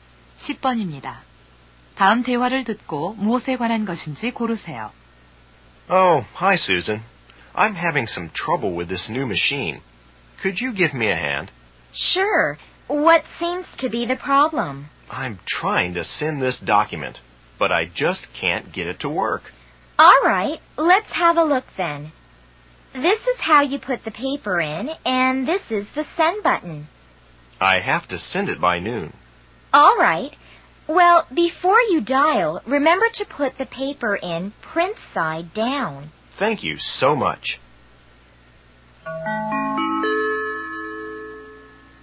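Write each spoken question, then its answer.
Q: 다음 대화를 듣고 무엇에 관한 것인지 고르세요.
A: 팩스 사용법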